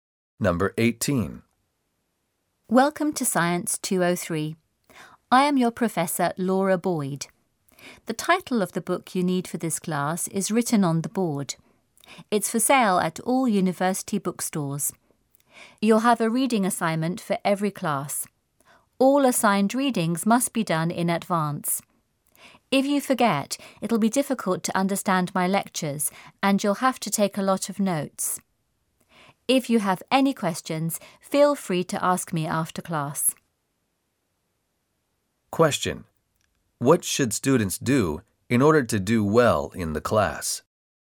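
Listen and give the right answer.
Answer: Do the assigned readings before each class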